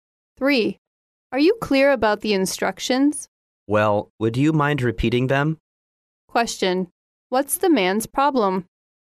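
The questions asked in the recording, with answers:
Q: What's the man's problem?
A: He isn't clear about the instructions and wants them repeated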